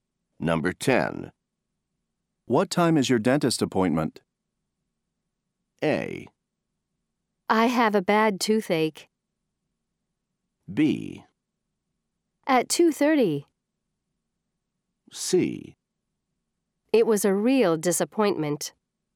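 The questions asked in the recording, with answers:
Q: What time is your dentist appointment?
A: B: At 2:30.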